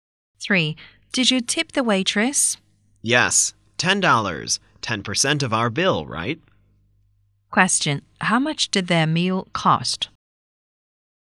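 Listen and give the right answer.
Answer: $100.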